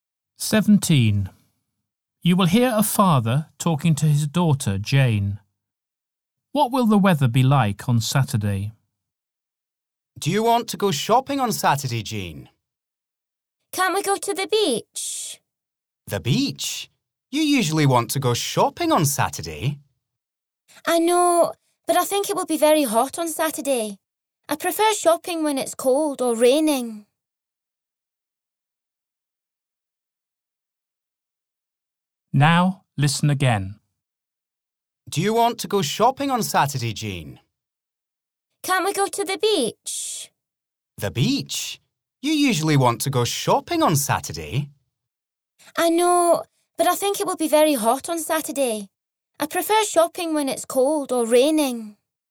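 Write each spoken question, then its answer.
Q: What will the weather be like on Saturday?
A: Very hot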